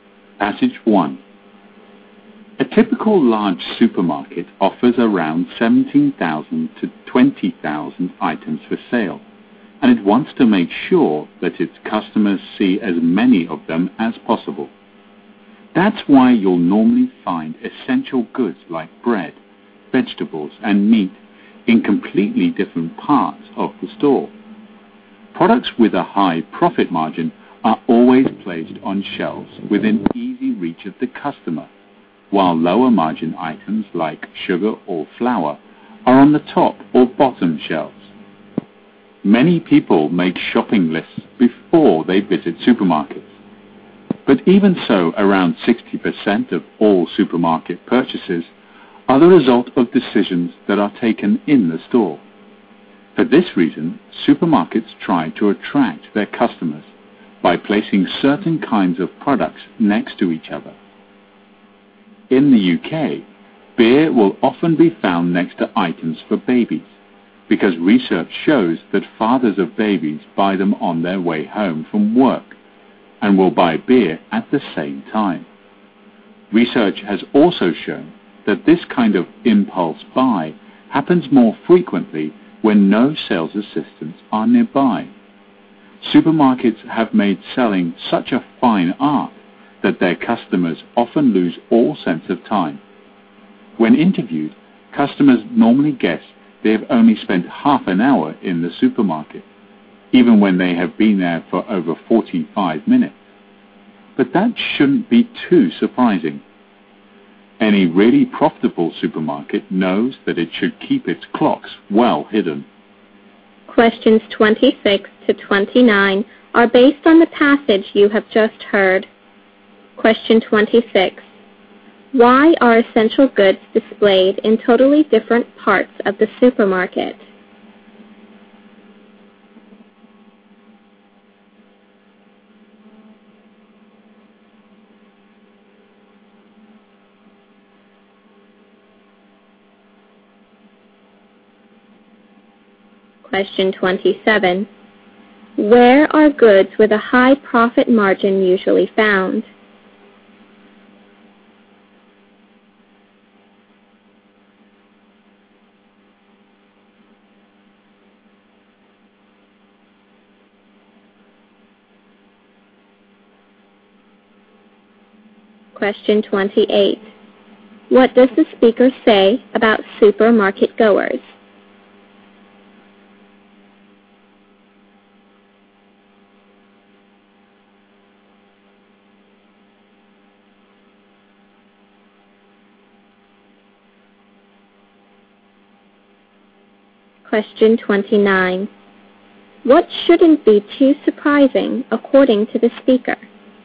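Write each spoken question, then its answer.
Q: Why are essential goods displayed in totally different parts of the supermarket?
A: So that customers see as many items as possible.

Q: Where are goods with a high profit margin usually found?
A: On shelves within easy reach of the customer.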